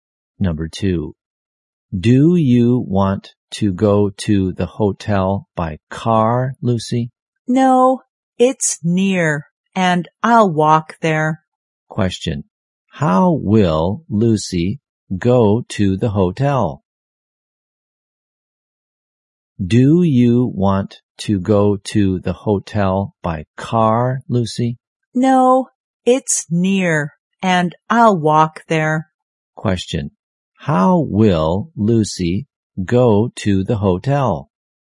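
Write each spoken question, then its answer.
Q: How will Lucy go to the hotel?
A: On foot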